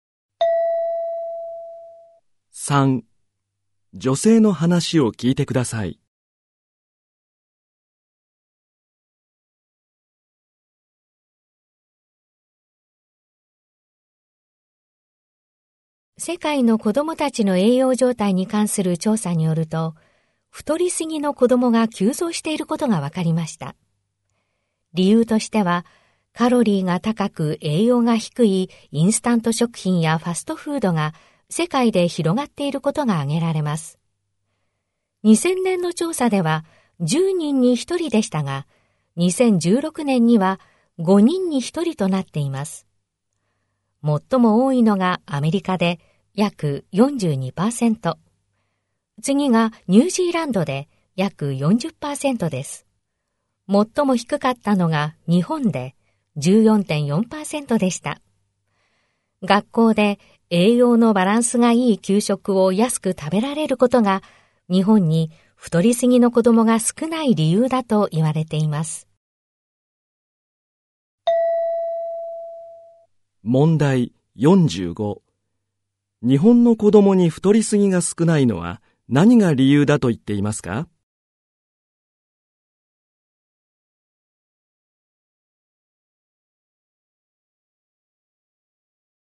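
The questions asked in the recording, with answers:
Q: 日本の子供に太りすぎが少ないのは何が理由だと言っていますか?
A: 学校で栄養バランスのいい給食を安く食べられるから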